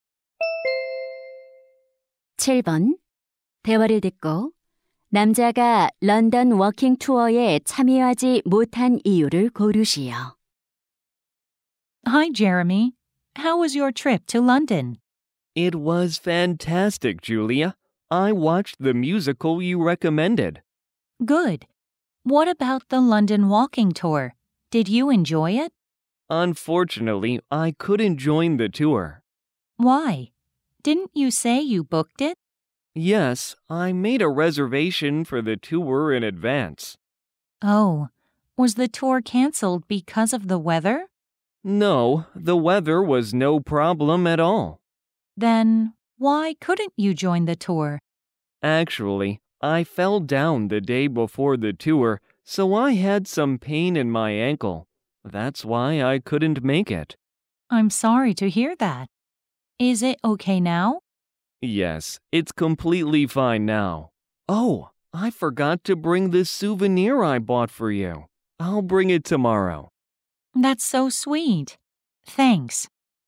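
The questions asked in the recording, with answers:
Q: 대화를 듣고 남자가 런던 워킹 투어에 참여하지 못한 이유를 고르시오.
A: 넘어져서 발목이 아팠기 때문에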